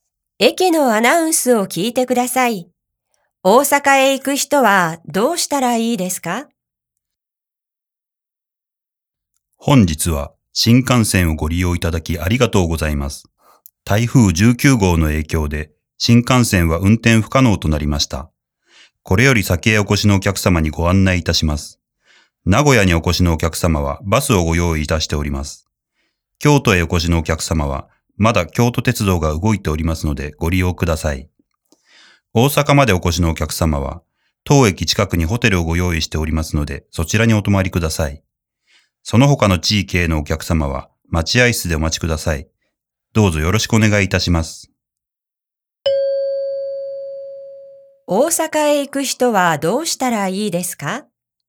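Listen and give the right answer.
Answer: 駅の近くのホテルに泊まる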